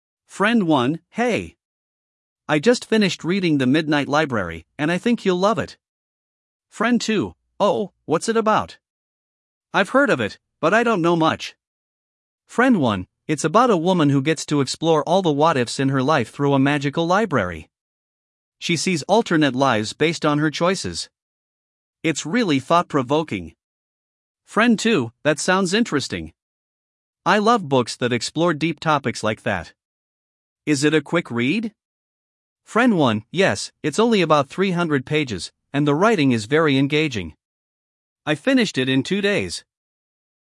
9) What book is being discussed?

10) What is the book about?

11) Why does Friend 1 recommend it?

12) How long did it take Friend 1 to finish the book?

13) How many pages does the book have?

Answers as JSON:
{"9": "The Midnight Library", "10": "Exploring alternate lives", "11": "Thought-provoking and engaging", "12": "Two days", "13": "300 pages"}

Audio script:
Friend 1: Hey! I just finished reading The Midnight Library, and I think you'll love it.
Friend 2: Oh, what's it about? I've heard of it, but I don't know much.
Friend 1: It's about a woman who gets to explore all the "what-ifs" in her life through a magical library. She sees alternate lives based on her choices. It's really thought-provoking.
Friend 2: That sounds interesting! I love books that explore deep topics like that. Is it a quick read?
Friend 1: Yes, it's only about 300 pages, and the writing is very engaging. I finished it in two days!